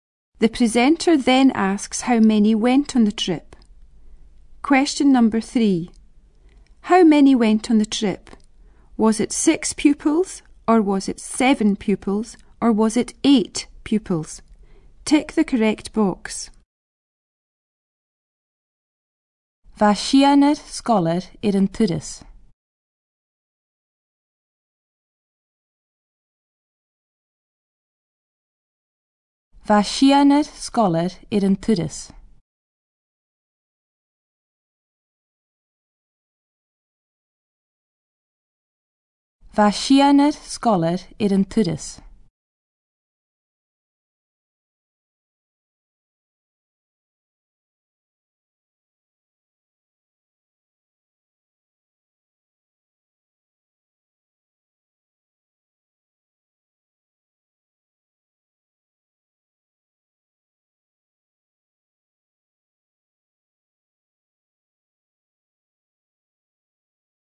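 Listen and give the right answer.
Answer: 6 pupils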